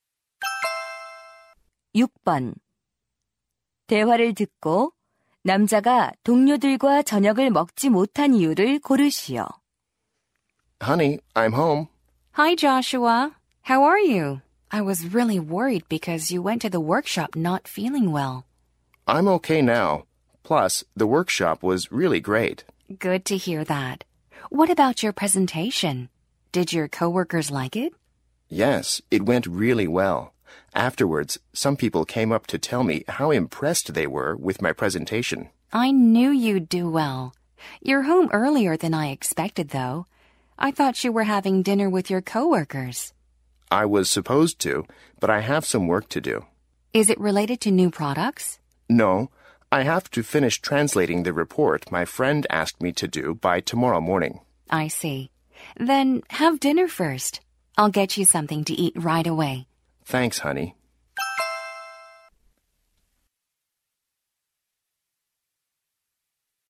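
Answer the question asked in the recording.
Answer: 친구가 부탁한 보고서 번역을 끝내야 해서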